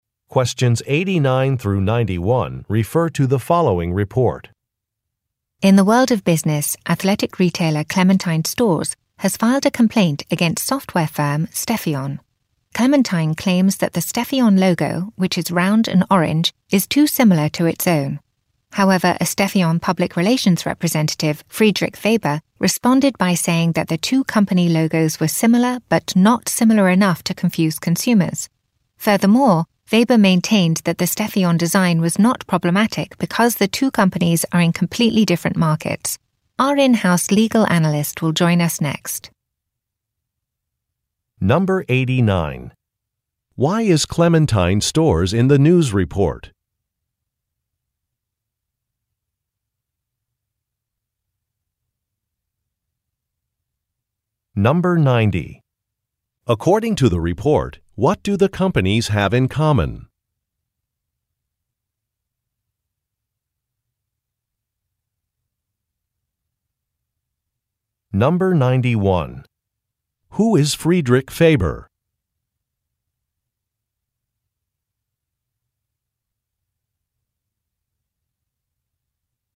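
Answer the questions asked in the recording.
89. It filed a complaint against Stefion.
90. Similar round, orange logos
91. A Stefion public relations representative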